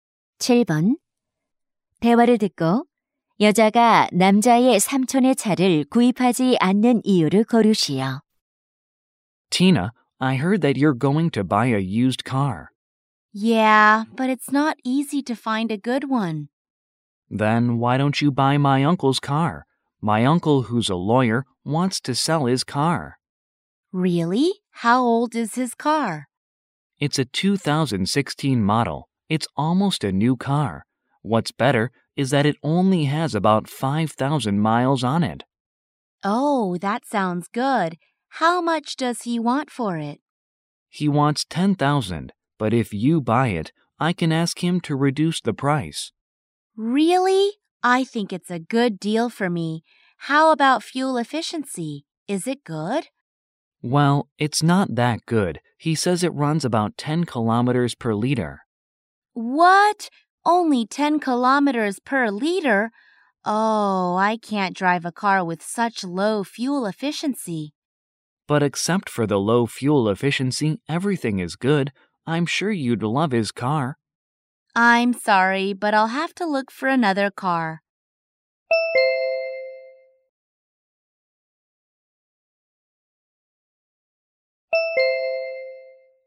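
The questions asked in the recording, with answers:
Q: 대화를 듣고 여자가 남자의 삼촌의 차를 구입하지 않는 이유를 고르시오.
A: 연비가 낮아서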